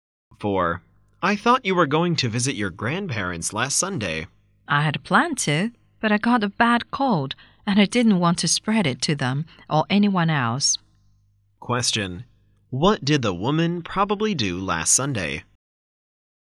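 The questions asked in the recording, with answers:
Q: What did the woman probably do last Sunday?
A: She stayed at home because she had a bad cold.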